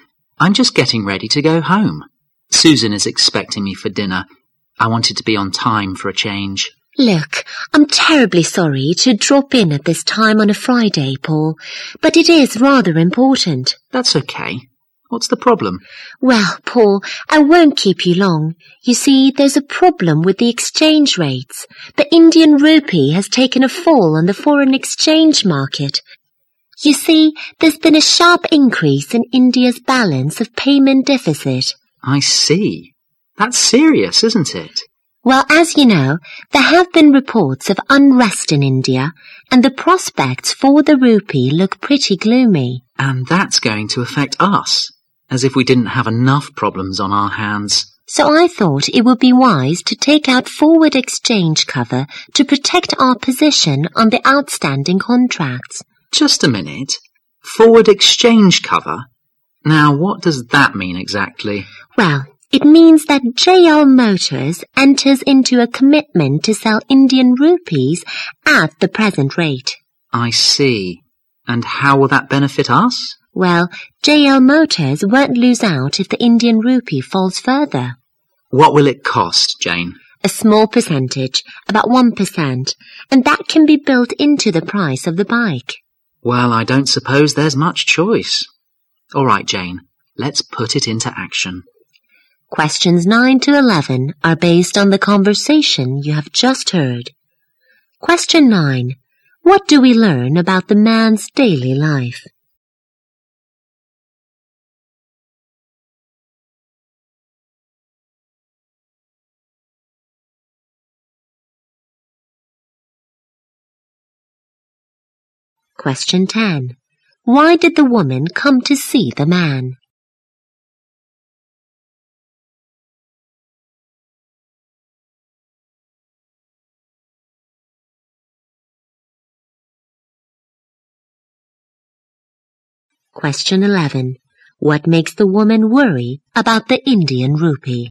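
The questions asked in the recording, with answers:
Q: Why did the woman come to see the man?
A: To discuss a problem with the exchange rates (the fall of the Indian rupee).

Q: What makes the woman worry about the Indian rupee?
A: A sharp increase in India's balance of payments deficit and reports of unrest in India.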